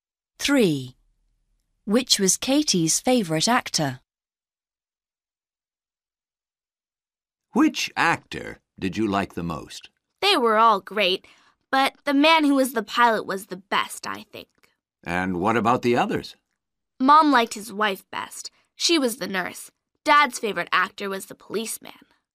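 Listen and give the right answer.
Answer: The man who was the pilot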